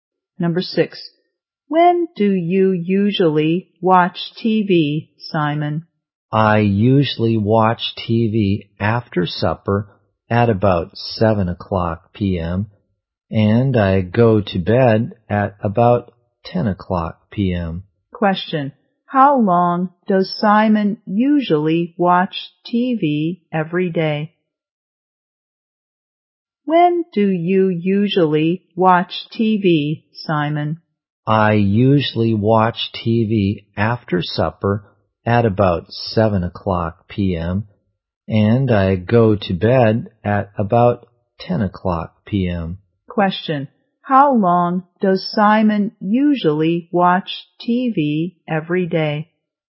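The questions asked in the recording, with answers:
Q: How long does Simon usually watch TV every day?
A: About three hours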